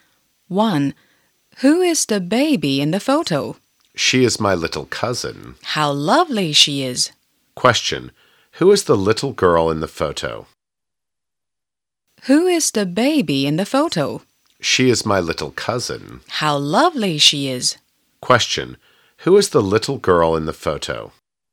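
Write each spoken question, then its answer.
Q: Who is the little girl in the photo?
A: She is the speaker's little cousin.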